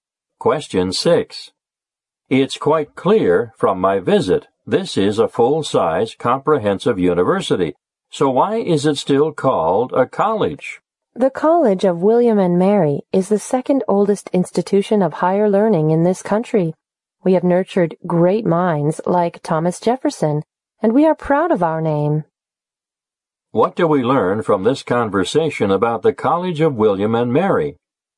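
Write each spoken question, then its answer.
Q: What do we learn from this conversation about the College of William and Mary?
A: It is the second oldest institution of higher learning in the country and is proud of its name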